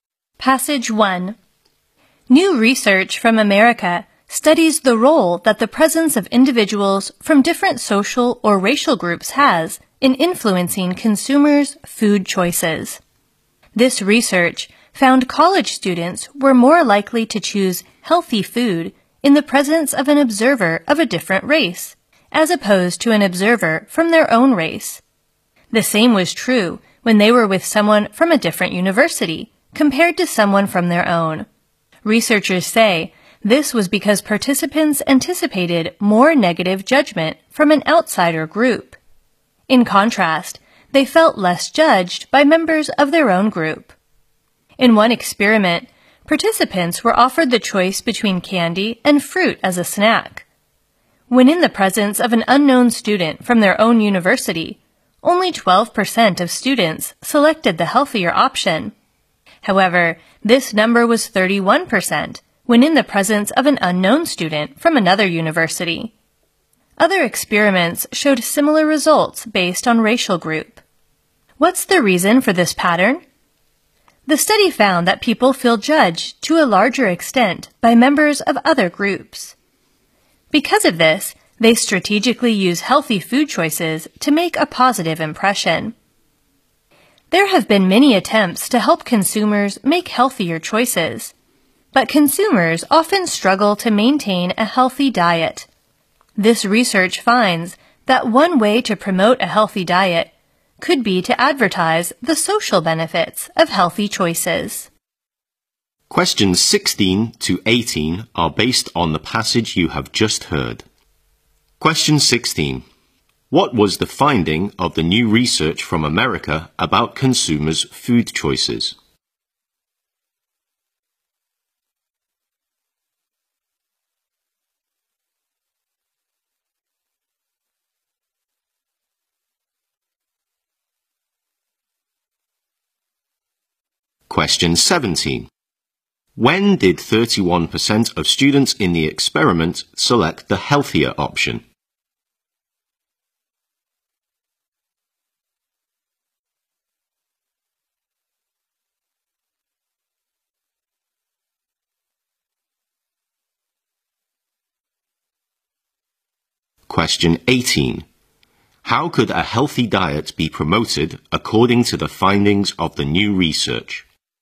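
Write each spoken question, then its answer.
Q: What was the finding of the new research from America about consumers' food choices?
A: People chose healthier food when observed by someone from a different group.

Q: When did 31% of students in the experiment select the healthier option?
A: When an unknown student from another university was present.

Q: How could a healthy diet be promoted according to the findings of the new research?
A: By advertising the social benefits of healthy choices.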